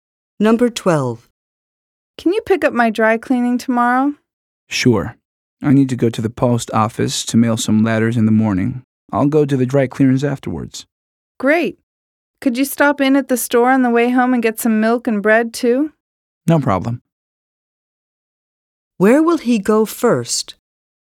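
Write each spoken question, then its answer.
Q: Where will he go first?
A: The post office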